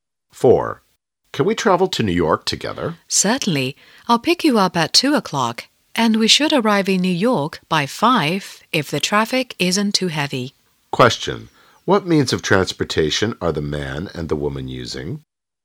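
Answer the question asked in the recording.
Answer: A car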